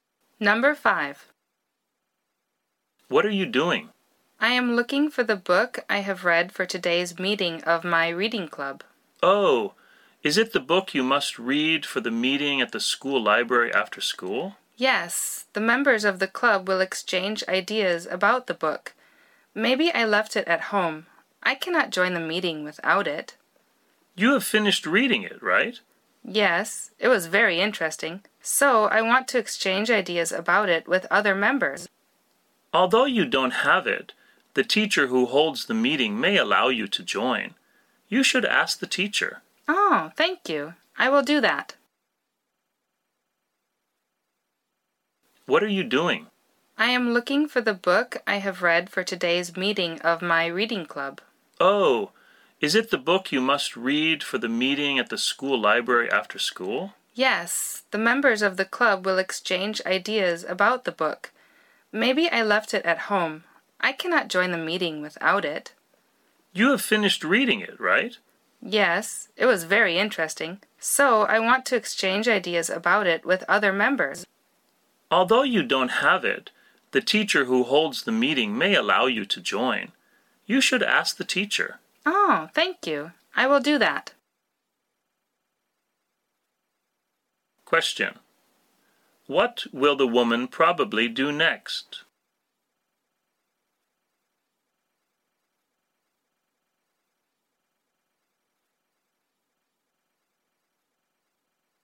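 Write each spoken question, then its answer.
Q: What will the woman probably do next?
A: Ask the teacher if she can join the meeting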